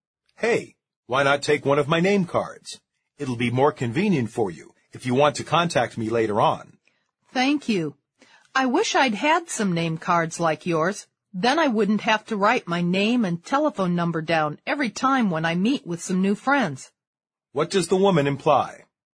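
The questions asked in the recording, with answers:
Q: What does the woman imply?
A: She doesn't have name cards of her own and would like some.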